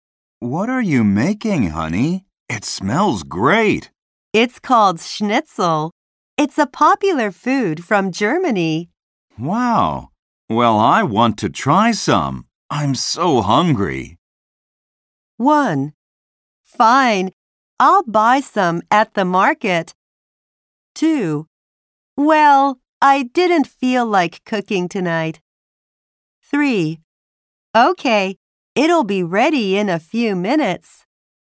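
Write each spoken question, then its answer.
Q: I'm so hungry.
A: 3: Okay, it'll be ready in a few minutes.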